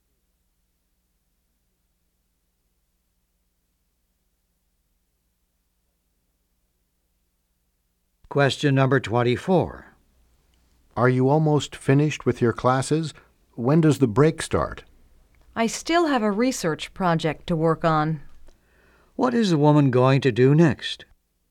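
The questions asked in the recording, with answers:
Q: What is the woman going to do next?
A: Work on a research project.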